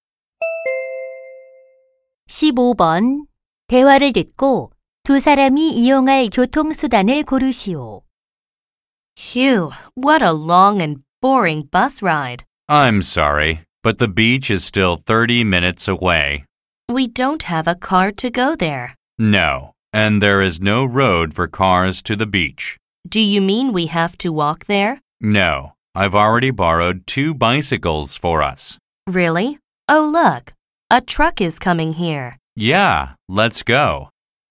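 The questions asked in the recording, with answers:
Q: 대화를 듣고 두 사람이 이용할 교통수단을 고르시오.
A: 자전거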